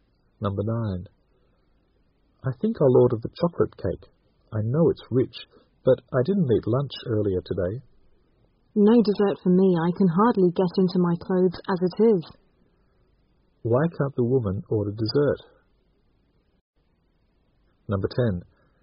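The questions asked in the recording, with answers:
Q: Why can't the woman order dessert?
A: She is worried about gaining weight; her clothes are too tight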